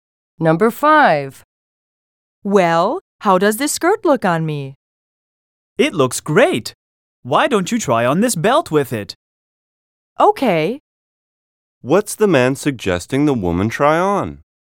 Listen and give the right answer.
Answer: The man is suggesting that the woman try on a belt.